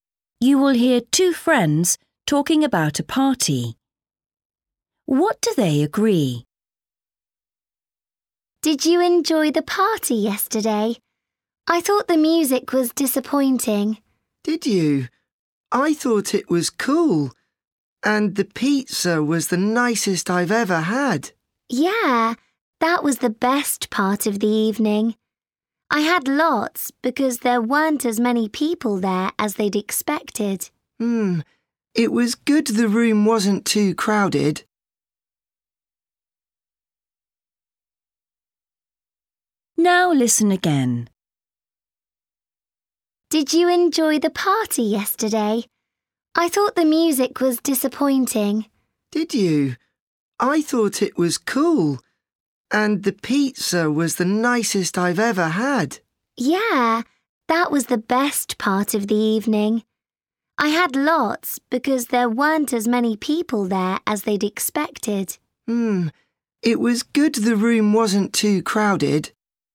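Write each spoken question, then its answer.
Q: What do they agree?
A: The pizza was the best part of the evening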